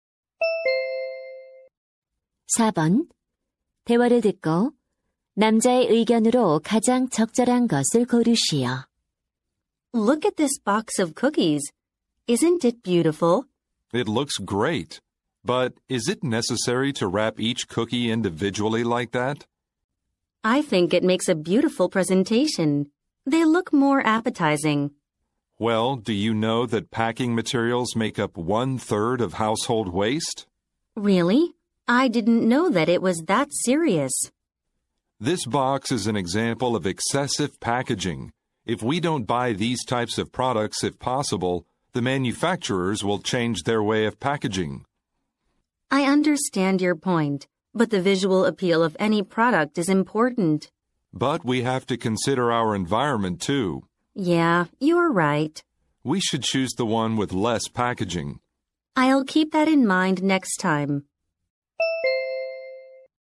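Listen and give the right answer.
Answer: 환경을 위해 과대 포장된 제품을 사지 말아야 한다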